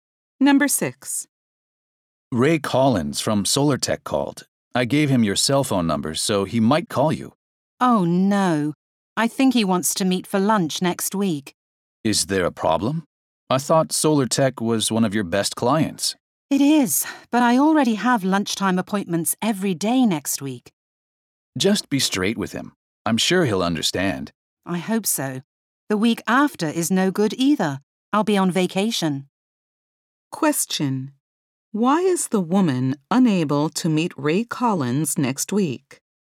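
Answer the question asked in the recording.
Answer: She already has lunch appointments every day next week.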